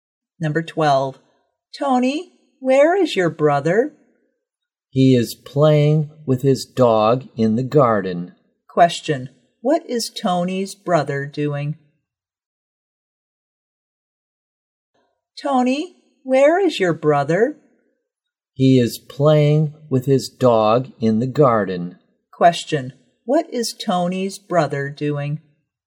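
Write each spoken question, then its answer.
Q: Question, what is Tony's brother doing?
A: Playing with his dog in the garden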